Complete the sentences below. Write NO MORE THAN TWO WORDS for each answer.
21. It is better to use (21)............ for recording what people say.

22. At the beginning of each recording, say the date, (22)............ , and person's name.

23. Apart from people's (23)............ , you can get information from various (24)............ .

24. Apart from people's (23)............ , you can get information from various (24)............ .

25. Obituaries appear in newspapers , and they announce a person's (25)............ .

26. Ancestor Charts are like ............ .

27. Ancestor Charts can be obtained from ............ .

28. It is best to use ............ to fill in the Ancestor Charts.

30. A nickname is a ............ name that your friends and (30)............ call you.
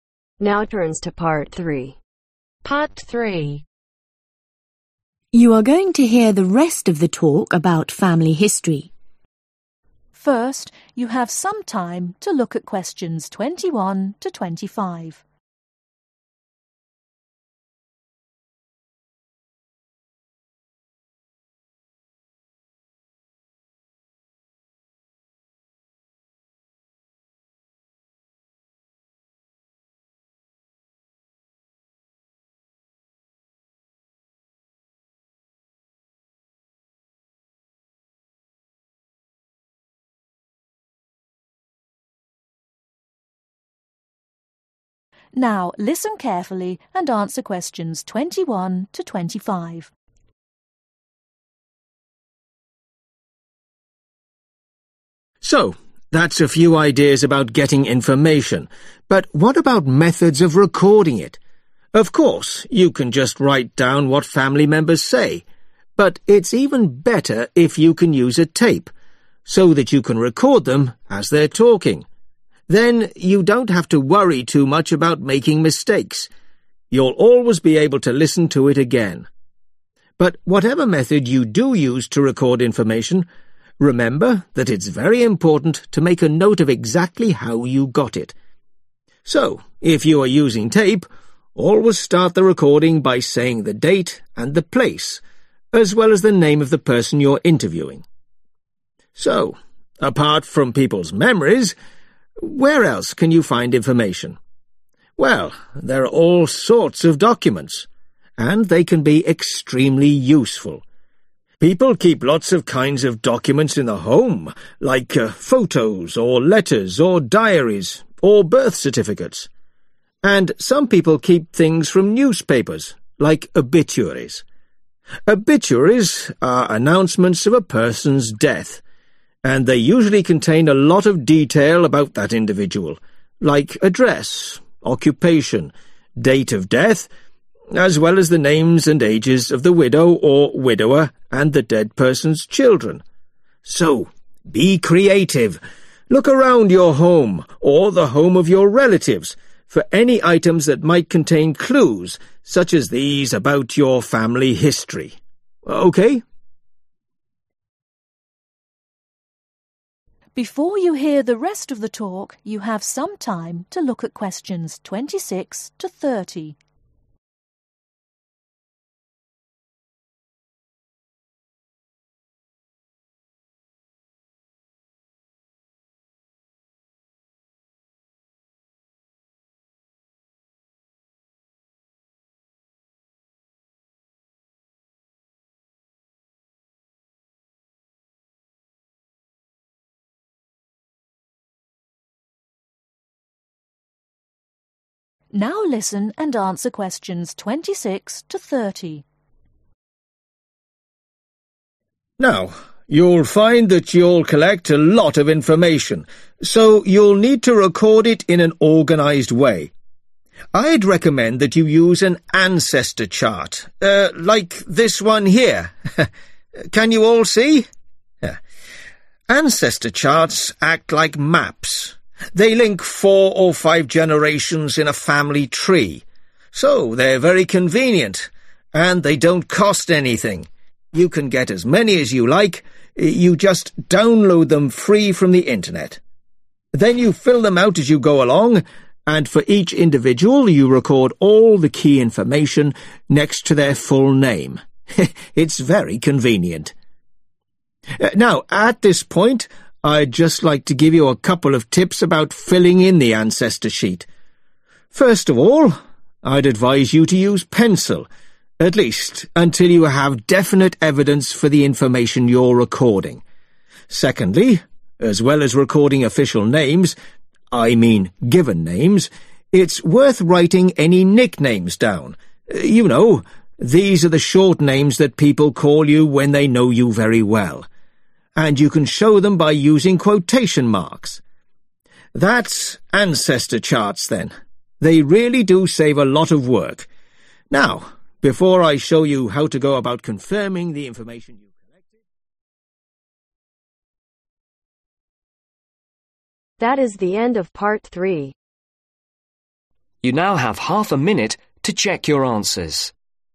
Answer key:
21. a Tape
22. Place
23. Memories
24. Documents
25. Death
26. Maps
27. The Internet
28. Pencil
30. Family